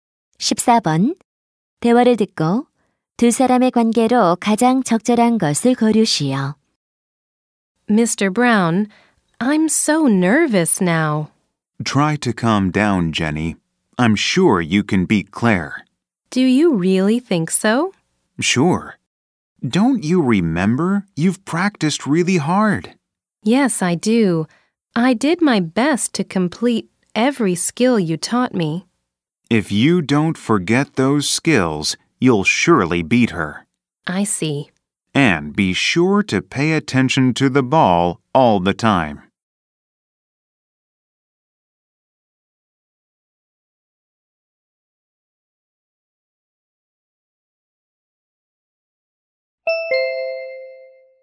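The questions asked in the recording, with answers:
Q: 대화를 듣고 두 사람의 관계로 가장 적절한 것을 고르시오.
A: 코치와 선수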